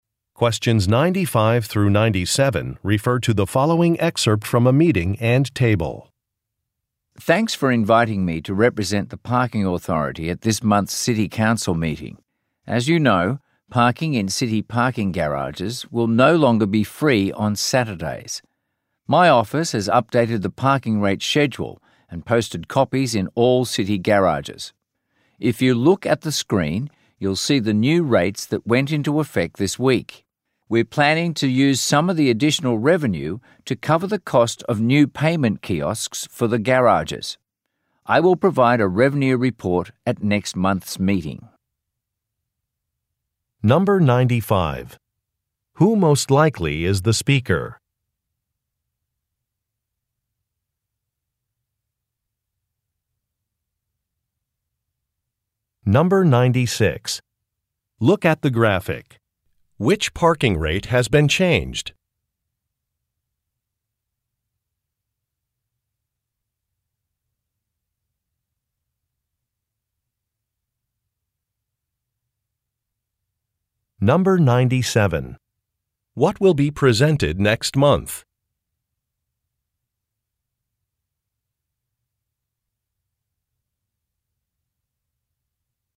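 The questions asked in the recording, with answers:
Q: Who most likely is the speaker?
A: A representative of the city Parking Authority

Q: What will be presented next month?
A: A revenue report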